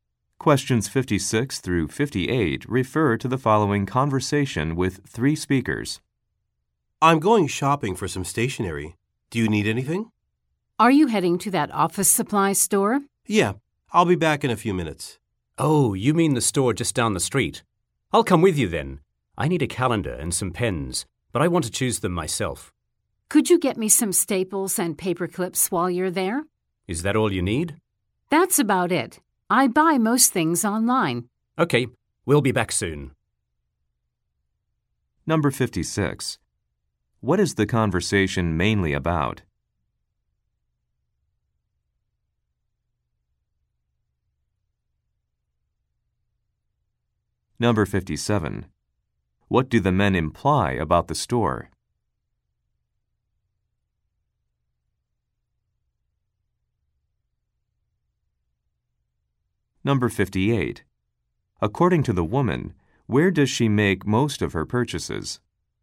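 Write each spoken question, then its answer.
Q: What is the conversation mainly about?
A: Shopping for stationery

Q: What do the men imply about the store?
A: It is close by

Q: According to the woman, where does she make most of her purchases?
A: Online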